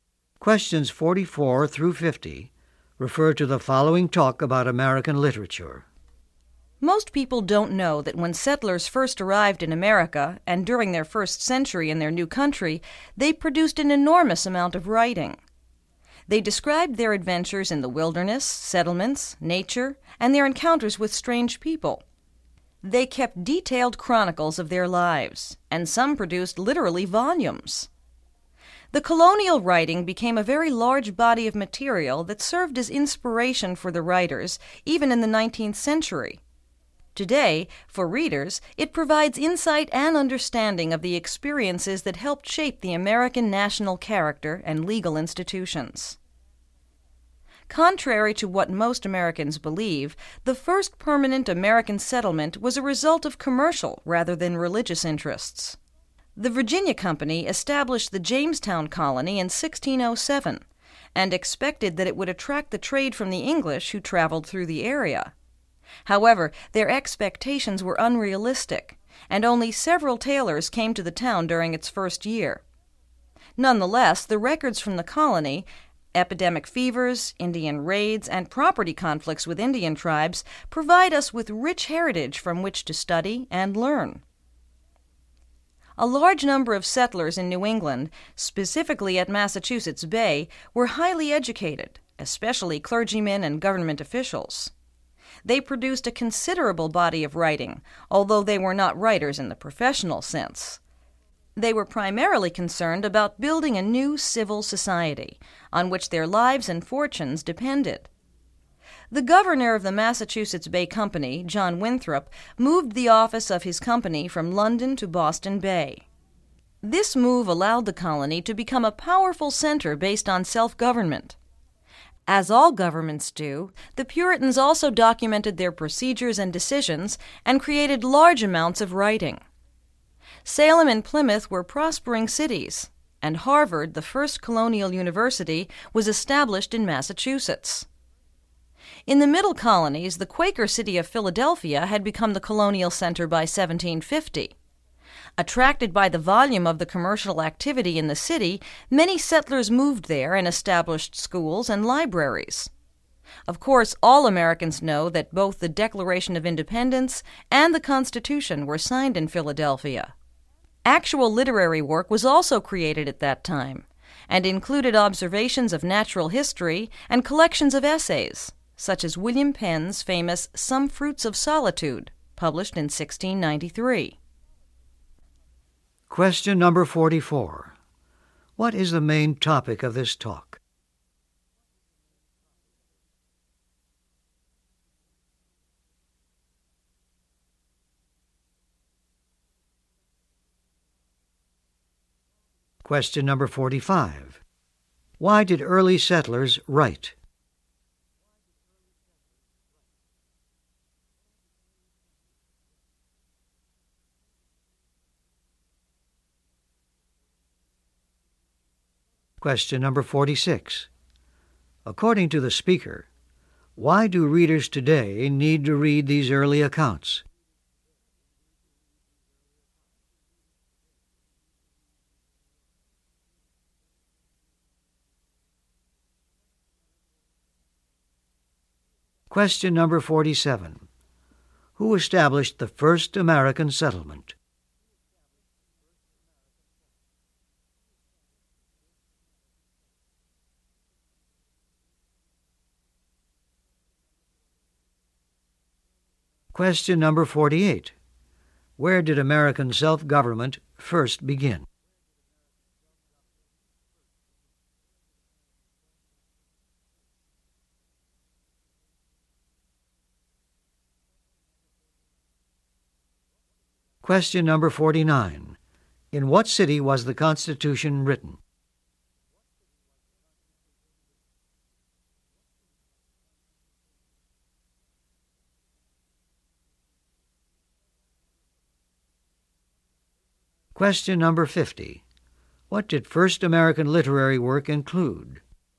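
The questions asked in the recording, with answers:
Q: According to the speaker, why do readers today need to read these early accounts?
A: To understand the experiences that shaped the American national character and legal institutions

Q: Who established the first American settlement?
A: The Virginia Company

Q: Where did American self-government first begin?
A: Massachusetts Bay Colony (Boston)

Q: In what city was the Constitution written?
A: Philadelphia

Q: What did first American literary work include?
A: Observations of natural history and collections of essays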